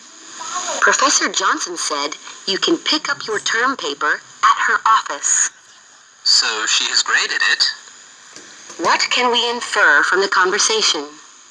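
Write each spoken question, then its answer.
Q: What can we infer from the conversation?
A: Professor Johnson has graded the term paper.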